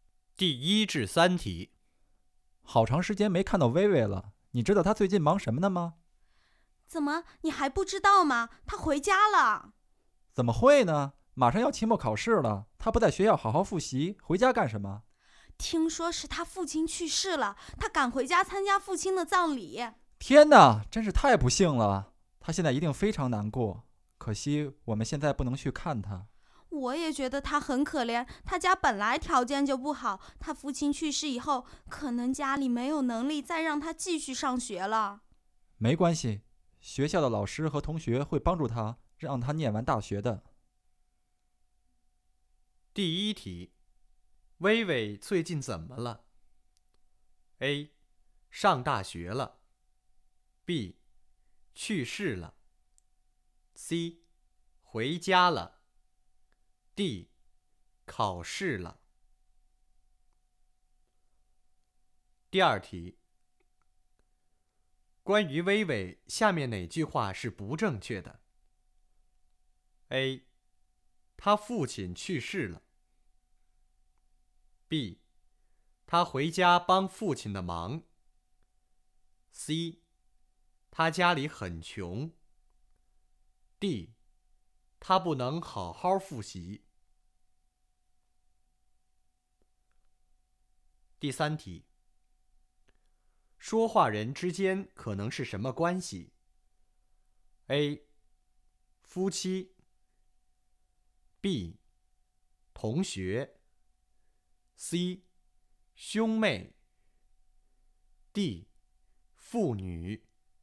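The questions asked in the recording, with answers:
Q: 薇薇最近怎么了?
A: C: 回家了。

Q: 关于薇薇,下面哪句话是不正确的?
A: B: 他回家帮父亲的忙。

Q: 说话人之间可能是什么关系?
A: B: 同学。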